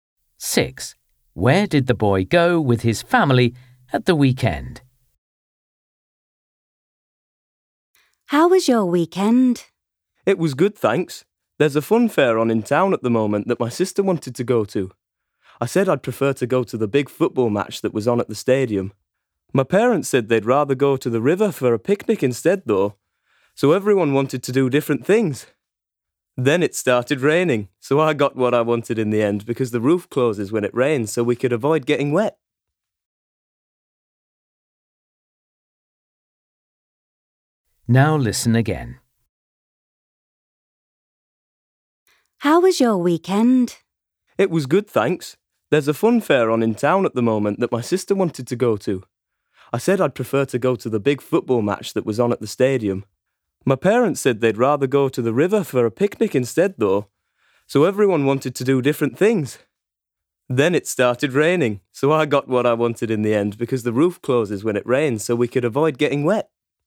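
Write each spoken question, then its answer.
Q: Where did the boy go with his family at the weekend?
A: to a football match at the stadium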